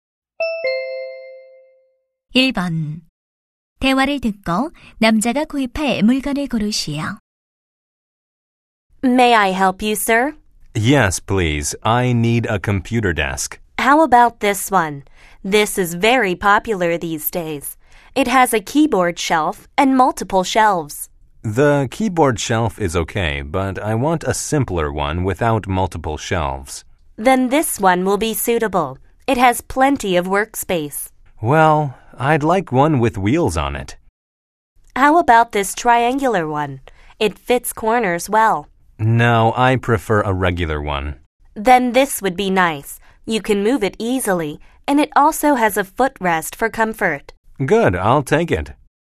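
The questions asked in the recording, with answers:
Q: 대화를 듣고 남자가 구입할 물건을 고르시오.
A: 바퀴와 발받침이 있는 일반형 컴퓨터 책상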